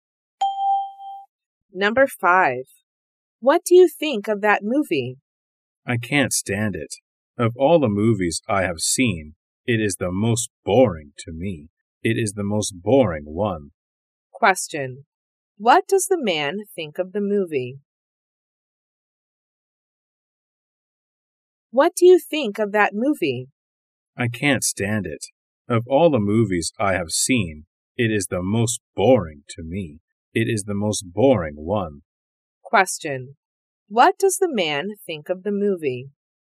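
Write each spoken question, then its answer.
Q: Question. What does the man think of the movie?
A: It is the most boring one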